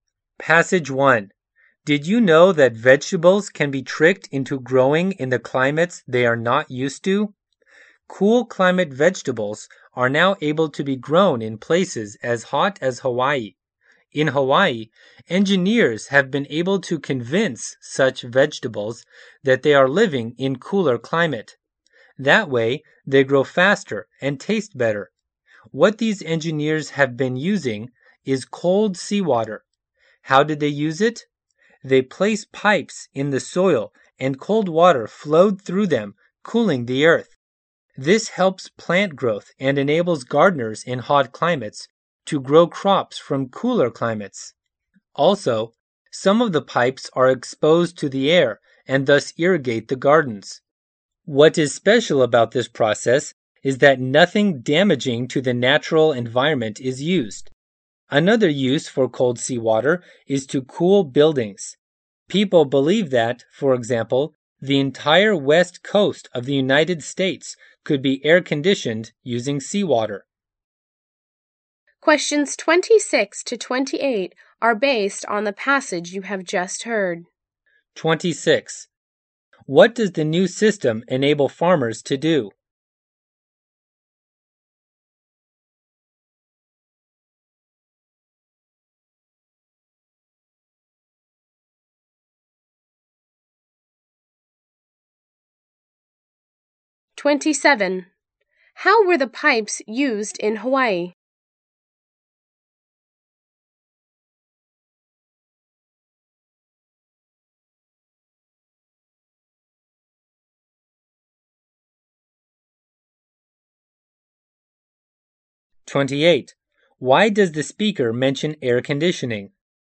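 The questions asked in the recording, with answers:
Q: What does the new system enable farmers to do?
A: Grow cool-climate vegetables in hot climates

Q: How were the pipes used in Hawaii?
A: Cold seawater flowed through them to cool the soil

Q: Why does the speaker mention air conditioning?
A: As another use of cold seawater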